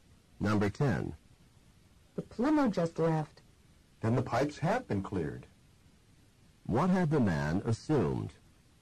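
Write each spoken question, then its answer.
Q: What had the man assumed?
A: That the pipes had not been cleared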